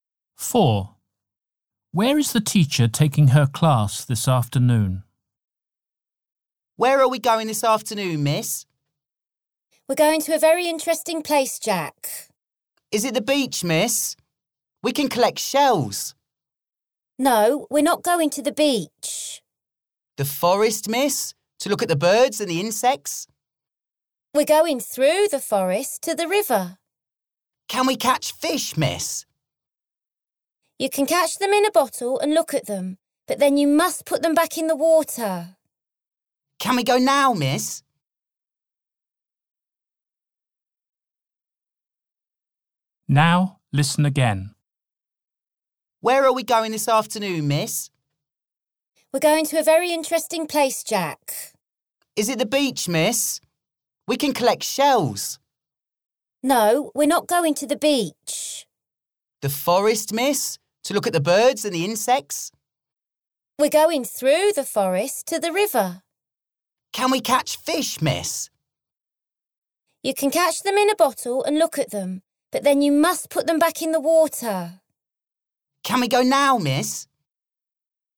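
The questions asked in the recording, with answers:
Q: Where is the teacher taking her class this afternoon?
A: to the river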